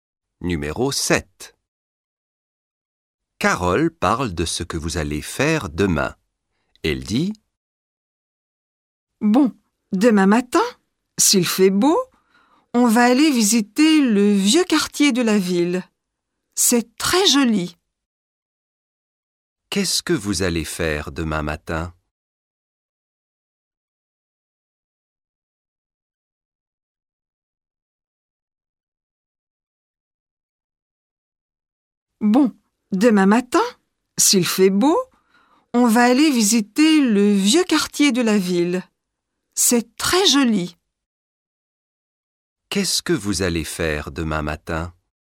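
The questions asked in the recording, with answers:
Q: Qu'est-ce que vous allez faire demain matin?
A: visiter le vieux quartier de la ville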